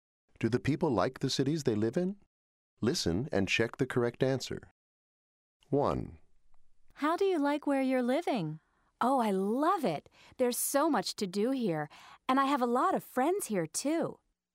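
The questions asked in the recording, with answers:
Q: How do you like where you're living?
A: Yes, likes it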